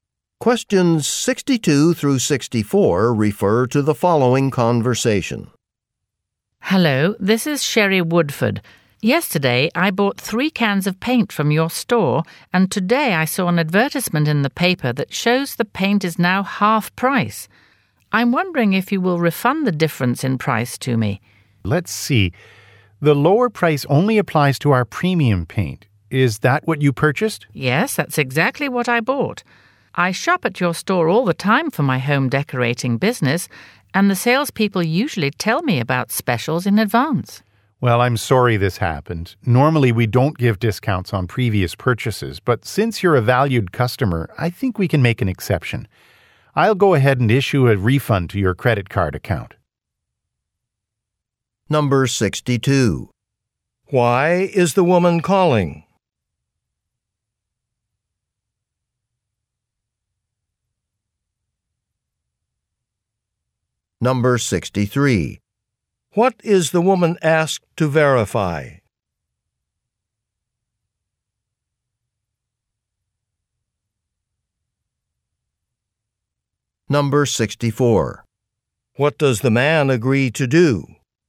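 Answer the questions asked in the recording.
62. To ask for a refund of the price difference
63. That she bought the premium paint
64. Issue a refund to her credit card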